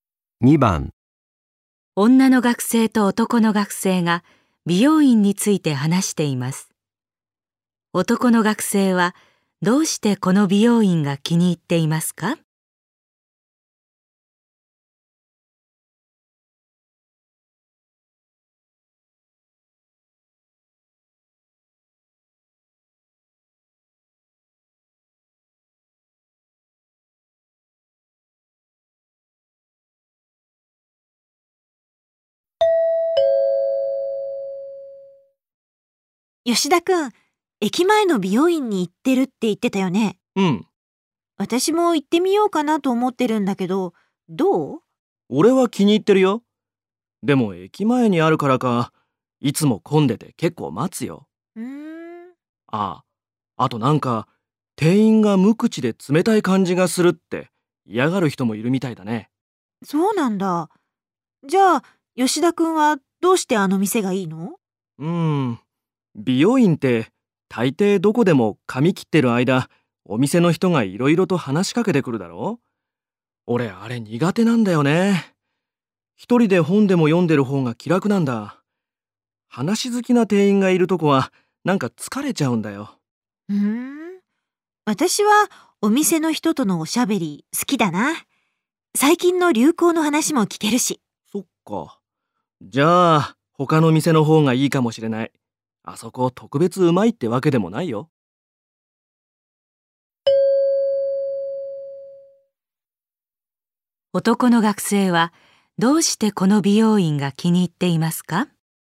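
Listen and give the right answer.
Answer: 店員が話しかけてこないから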